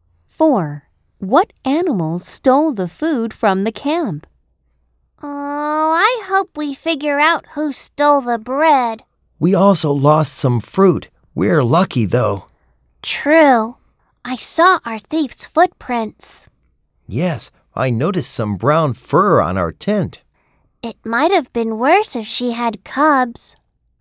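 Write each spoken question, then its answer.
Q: What animal stole the food from the camp?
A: A bear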